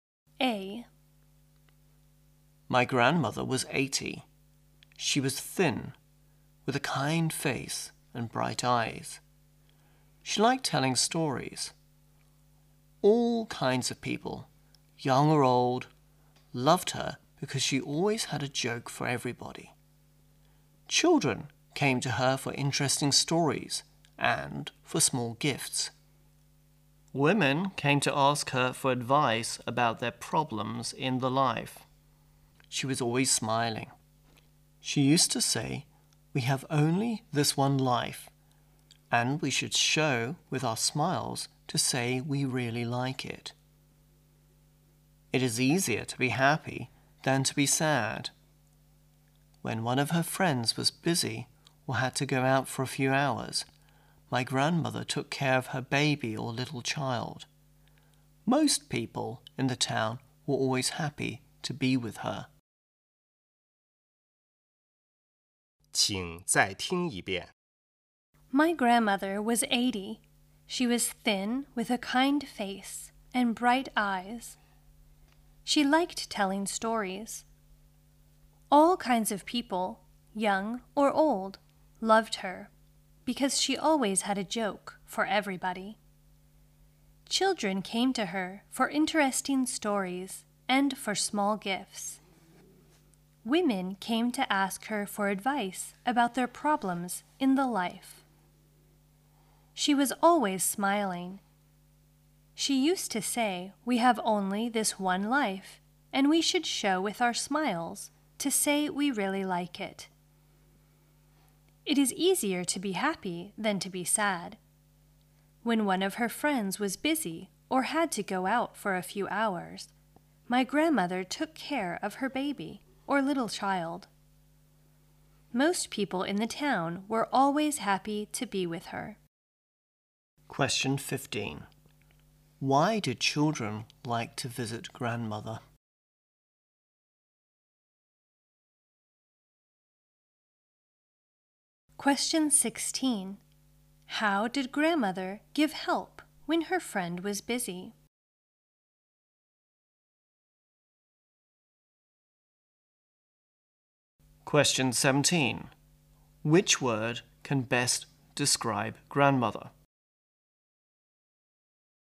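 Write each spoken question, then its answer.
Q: Why do children like to visit grandmother?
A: For interesting stories and small gifts.

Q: How did grandmother give help when her friend was busy?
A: She looked after her friend's baby or little child.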